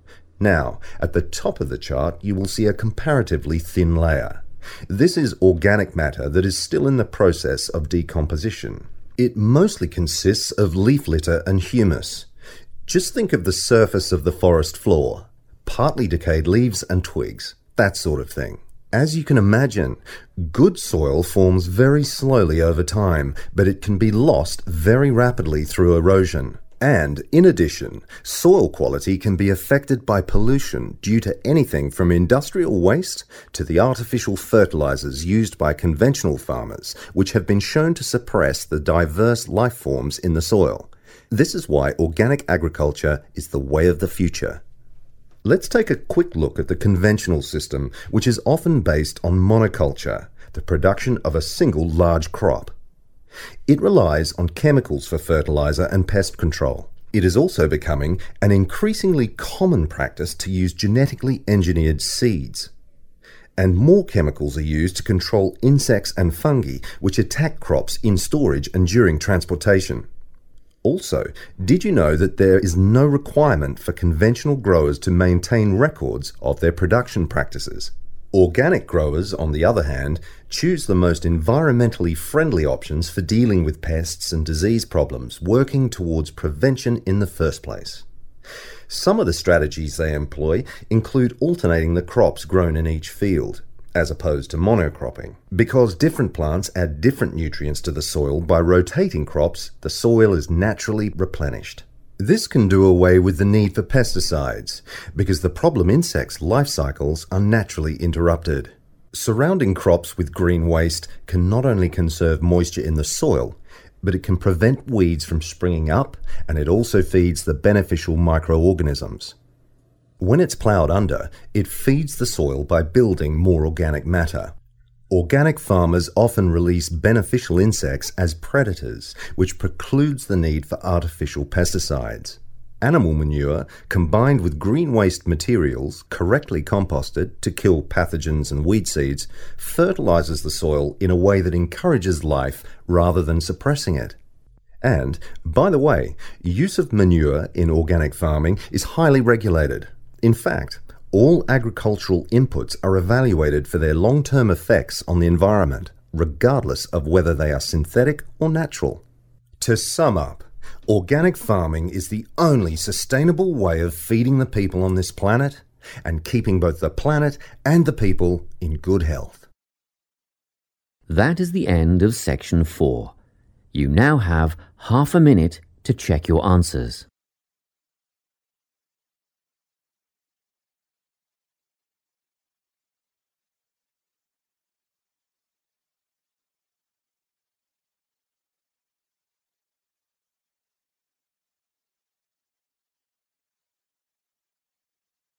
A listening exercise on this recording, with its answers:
Complete the notes below. Write NO MORE THAN TWO WORDS for each answer.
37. _____ from various sources, including chemical fertilisers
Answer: pollution

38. synthetic fertiliser & chemicals used for _____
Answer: pest control

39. no need for documentation of _____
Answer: production practices

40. use of insects as natural _____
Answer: predator

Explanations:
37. The correct answer is identified because the speaker mentions two main problems for soil. The first is erosion, and the second is pollution. The speaker explains that this pollution comes from many different places, such as factory waste and the human-made (artificial) fertilisers used in standard farming.
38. The correct answer is 'pest control' because the transcript describes how many regular (conventional) farms use chemicals. According to the talk, these chemicals are used for two main purposes: to help things grow (fertiliser) and to stop bugs or animals from damaging the plants (pest control). Since the notes already mentioned 'fertiliser', 'pest control' is the missing piece of information.
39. The correct answer is "production practices" because the transcript explains that conventional farmers are not required to keep "records" (which serves as documentation) of how they grow their plants. The phrase "no need for documentation" in the notes matches the speaker's mention that there is "no requirement" to "maintain records."
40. The correct answer is "predator" because the talk explains how organic farmers use helpful insects to hunt and eat the pests that damage crops. By using these natural hunters, farmers do not have to use man-made chemical poisons (pesticides) to kill bad insects. This matches the part of the notes asking about the use of insects as a natural solution.

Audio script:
On top of that, is the eluviation (or leaching) layer ... this is quite light in colour and is mostly just sand and silt. As we get near the surface, we find the topsoil. You will hear a lot of talk about topsoil amongst farmers and other agriculturalists. It's the most important layer of all because it's where seeds germinate and roots grow. Now, at the top of the chart, you will see a comparatively thin layer - this is organic matter that is still in the process of decomposition. It mostly consists of leaf litter and humus - just think of the surface of the forest floor - partly-decayed leaves and twigs - that sort of thing.
As you can imagine, good soil forms very slowly over time but it can be lost very rapidly through erosion. And, in addition, soil quality can be affected by pollution due to anything from industrial waste to the artificial fertilisers used by conventional farmers which have been shown to suppress the diverse life forms in the soil. This is why organic agriculture is the way of the future.
Let's take a quick look at the conventional system, which is often based on monoculture - the production of a single large crop. It relies on chemicals for fertiliser and pest control. It is also becoming an increasingly common practice to use genetically-engineered seeds. And more chemicals are used to control insects and fungi which attack crops in storage and during transportation. Also, did you know that there is no requirement for conventional growers to maintain records of their production practices?
Organic growers, on the other hand, choose the most environmentally-friendly options for dealing with pests and disease problems, working towards prevention in the first place. Some of the strategies they employ include alternating the crops grown in each field (as opposed to mono-cropping). Because different plants add different nutrients to the soil, by rotating crops, the soil is naturally replenished. This can do away with the need for pesticides, because the problem insects' life cycles are naturally interrupted.
Surrounding crops with green waste can not only conserve moisture in the soil, but it can prevent weeds from springing up and it also feeds the beneficial micro-organisms. When it's ploughed under, it feeds the soil by building more organic matter.
Organic farmers often release beneficial insects as predators which precludes the need for artificial pesticides. Animal manure combined with green waste materials, correctly composted (to kill pathogens and weed seeds), fertilises the soil in a way that encourages life rather than suppressing it. And, by the way, use of manure in organic farming is highly regulated - in fact, all agricultural inputs are evaluated for their long-term effects on the environment, regardless of whether they are synthetic or natural.
To sum up, organic farming is the only sustainable way of feeding the people on this planet and keeping both the planet and the people in good health.
That is the end of section 4. You now have half a minute to check your answers.